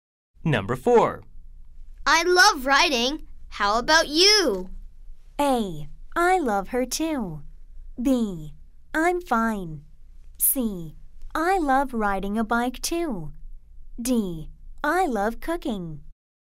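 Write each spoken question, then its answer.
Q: I love writing. How about you?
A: D: I love cooking.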